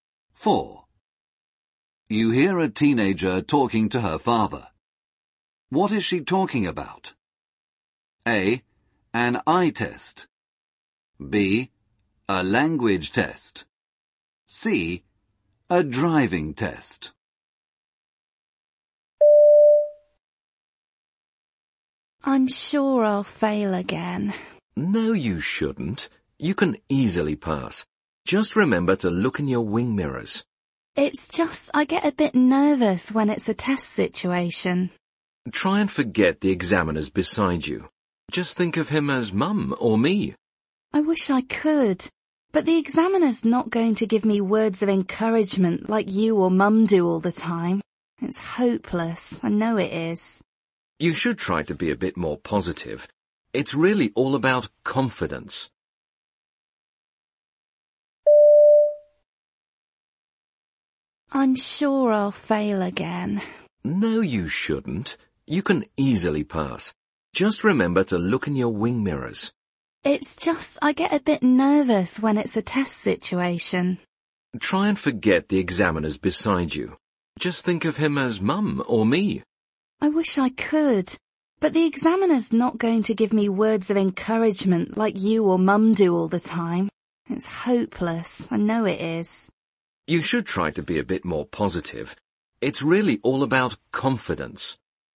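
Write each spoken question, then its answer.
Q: What is she talking about?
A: C: A driving test.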